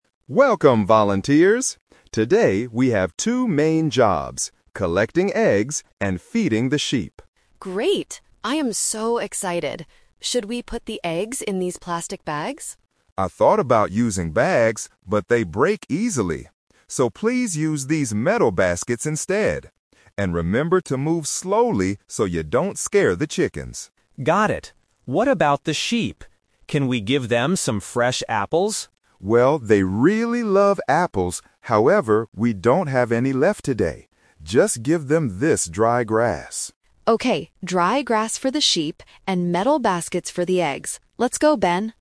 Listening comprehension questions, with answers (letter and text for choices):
Listen to the conversation between a farm owner and two volunteers, and choose the correct answer (A, B, or C).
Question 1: What should the volunteers use to hold the eggs?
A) Plastic bags.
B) Metal baskets.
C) Wooden boxes.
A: B) Metal baskets.

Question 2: Why can't the volunteers give apples to the sheep today?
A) Because the farm doesn't have any apples today.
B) Because the sheep do not like to eat apples.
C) Because apples will make the sheep sick.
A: A) Because the farm doesn't have any apples today.

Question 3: What will the sheep eat?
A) Fresh apples.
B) Special farm food.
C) Dry grass.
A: C) Dry grass.

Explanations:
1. Farmer Joe clearly says, "please use these metal baskets instead." Option (A) is the trap; Anna suggests using plastic bags, but the farmer rejects the idea because they break easily. Option (C) is not mentioned.
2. Farmer Joe says, "however, we don't have any left today." Option (B) is the trap; he actually says the sheep "really love apples." Option (C) is a plausible reason in real life, but it is not mentioned in the audio.
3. The farmer tells the volunteers to "Just give them this dry grass." Option (A) is the trap because it was Ben's original idea before the farmer changed the plan (The Twist). Option (B) is not mentioned.

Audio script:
Farmer Joe: Welcome, volunteers! Today, we have two main jobs: collecting eggs and feeding the sheep.
Anna: Great! I am so excited. Should we put the eggs in these plastic bags?
Farmer Joe: I thought about using bags, but they break easily. So, please use these metal baskets instead. And remember to move slowly so you don't scare the chickens.
Ben: Got it. What about the sheep? Can we give them some fresh apples?
Farmer Joe: Well, they really love apples, however, we don't have any left today. Just give them this dry grass.